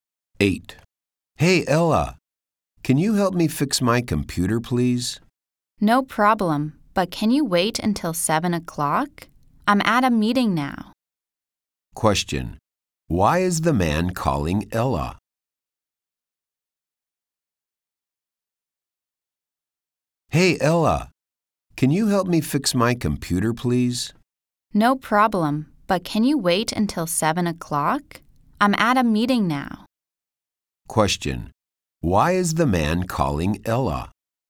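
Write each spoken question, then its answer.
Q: Why is the man calling Ella?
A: He wants her to help fix his computer.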